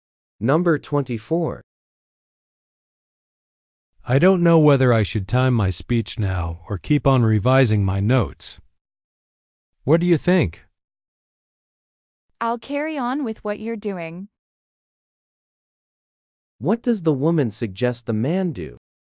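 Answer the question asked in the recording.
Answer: Keep revising his notes.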